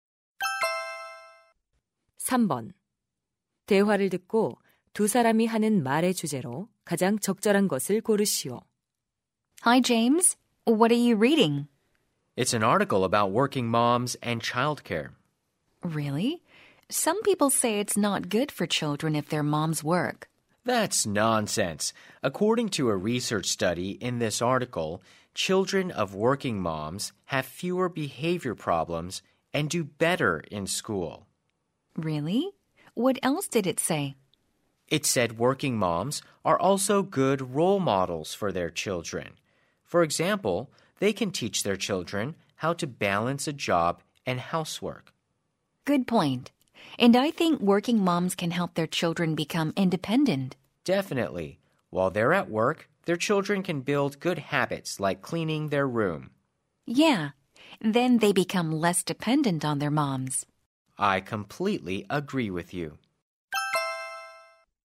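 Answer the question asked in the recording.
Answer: 일하는 엄마가 자녀에게 미치는 긍정적 영향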